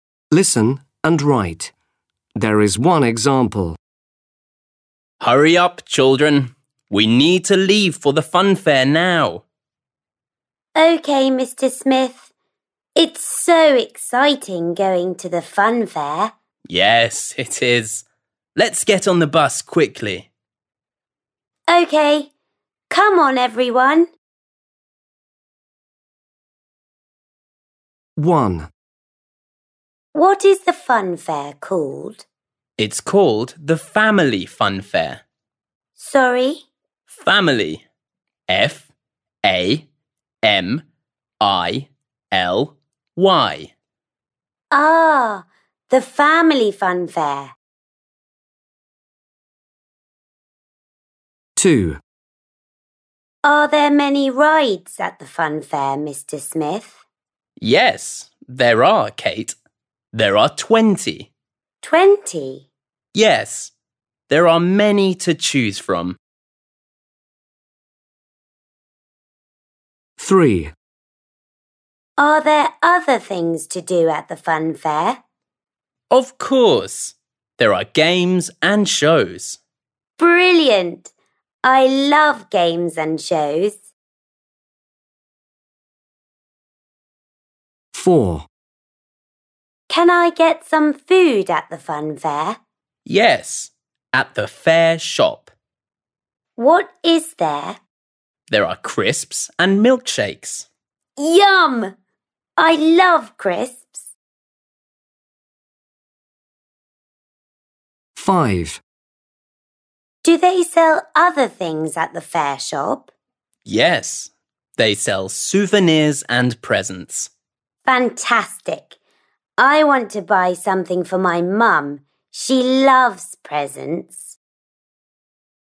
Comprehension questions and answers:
7. Listening - Listen and write. There is one example.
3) Other activities: .............. and shows.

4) Things you can eat: .............. and milkshakes.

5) Things you can buy: Souvenirs and .............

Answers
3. Games
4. Crisps
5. presents

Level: 5. Sınıf